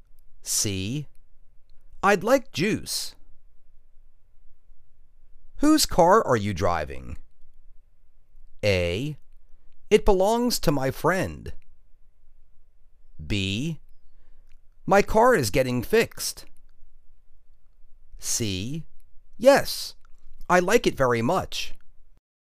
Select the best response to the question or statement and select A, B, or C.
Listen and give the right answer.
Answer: It belongs to my friend.